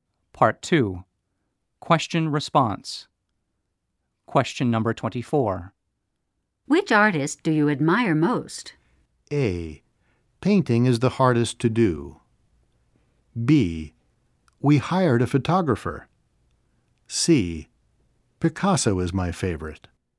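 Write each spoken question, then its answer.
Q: Which artist do you admire most?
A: C: Picasso is my favorite.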